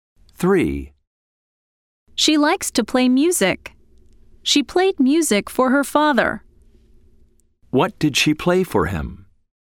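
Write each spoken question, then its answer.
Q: What did she play for him?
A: music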